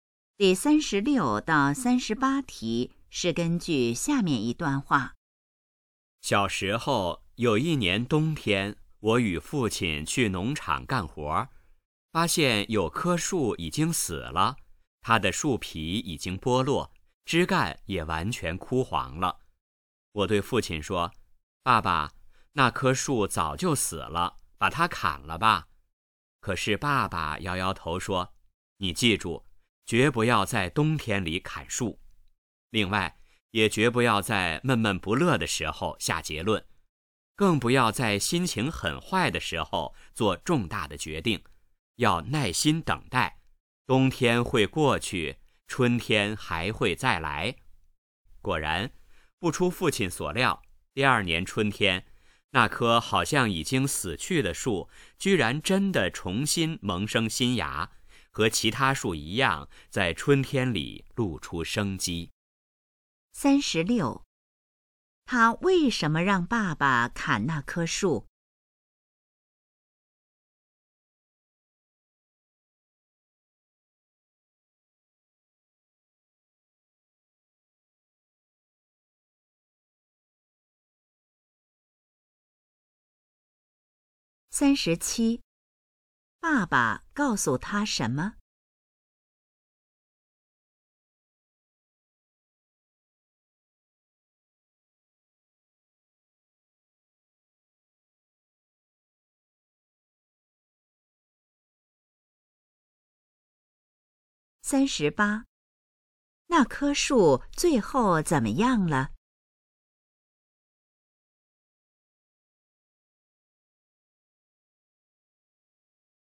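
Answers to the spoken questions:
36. 他以为那棵树已经死了
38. 第二年春天重新萌生新芽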